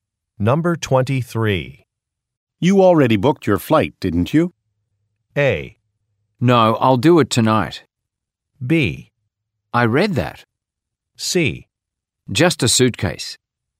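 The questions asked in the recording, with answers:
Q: You already booked your flight, didn't you?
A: A: No, I'll do it tonight.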